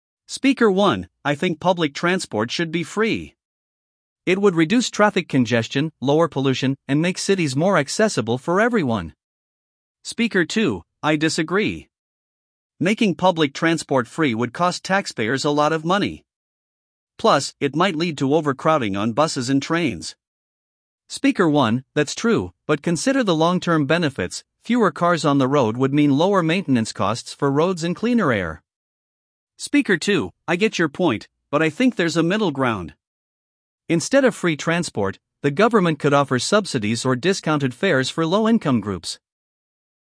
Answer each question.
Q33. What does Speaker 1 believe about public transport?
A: Public transport should be free

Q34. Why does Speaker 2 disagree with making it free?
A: Costs taxpayers money

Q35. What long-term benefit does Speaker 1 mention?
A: Cleaner air and lower road maintenance

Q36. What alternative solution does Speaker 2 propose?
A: Subsidies/discounted fares

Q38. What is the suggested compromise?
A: Middle ground (subsidies)

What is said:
Speaker 1: I think public transport should be free. It would reduce traffic congestion, lower pollution, and make cities more accessible for everyone.
Speaker 2: I disagree. Making public transport free would cost taxpayers a lot of money. Plus, it might lead to overcrowding on buses and trains.
Speaker 1: That's true, but consider the long-term benefits: fewer cars on the road would mean lower maintenance costs for roads and cleaner air.
Speaker 2: I get your point, but I think there's a middle ground. Instead of free transport, the government could offer subsidies or discounted fares for low-income groups.